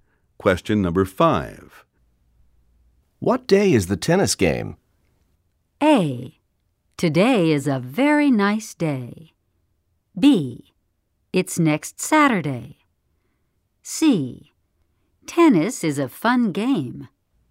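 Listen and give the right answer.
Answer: B: It's next Saturday.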